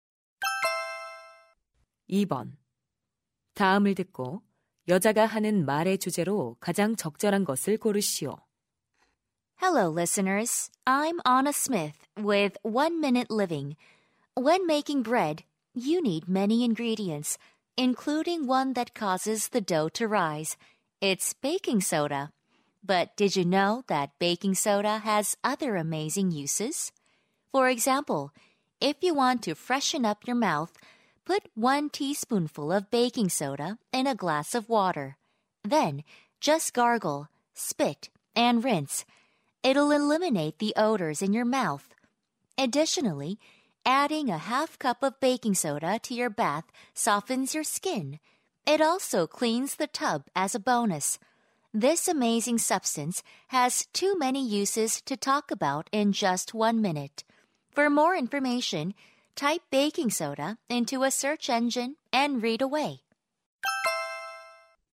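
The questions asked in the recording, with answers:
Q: 다음을 듣고 여자가 하는 말의 주제로 가장 적절한 것을 고르시오.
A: 베이킹 소다의 다양한 용도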